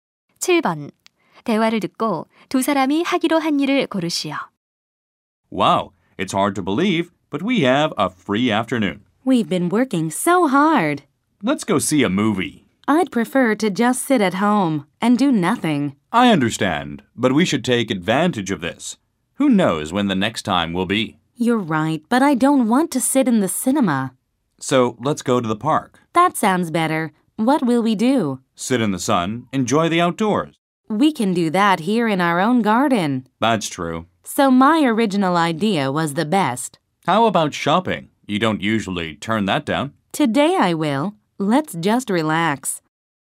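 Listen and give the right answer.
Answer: 집에서 쉬기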